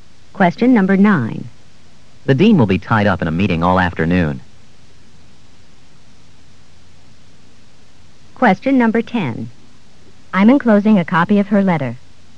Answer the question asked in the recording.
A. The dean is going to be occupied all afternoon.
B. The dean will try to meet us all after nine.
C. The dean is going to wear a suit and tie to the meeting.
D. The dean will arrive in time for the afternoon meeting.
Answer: A. The dean is going to be occupied all afternoon.

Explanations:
The dean will be tied up in a meeting all afternoon.

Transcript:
9. The dean will be tied up in a meeting all afternoon.